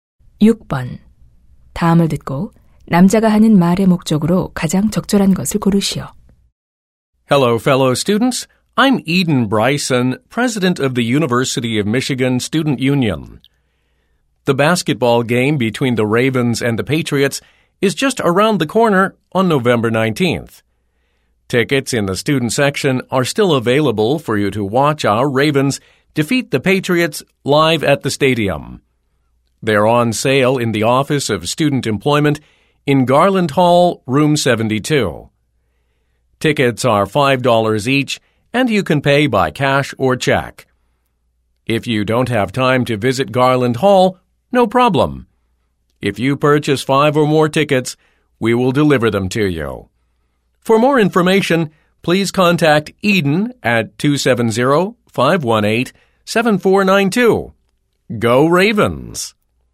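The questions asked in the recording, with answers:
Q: 다음을 듣고 남자가 하는 말의 목적으로 가장 적절한 것을 고르시오.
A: 농구 경기 학생석 입장권 구매를 안내하려고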